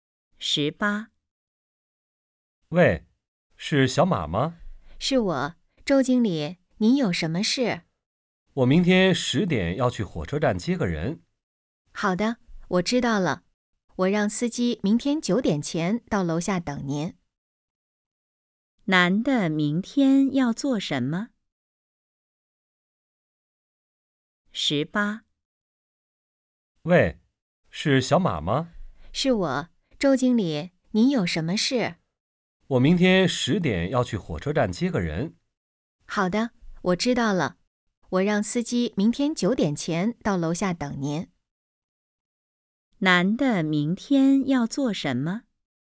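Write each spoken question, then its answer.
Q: 男的明天要做什么?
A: 去火车站接人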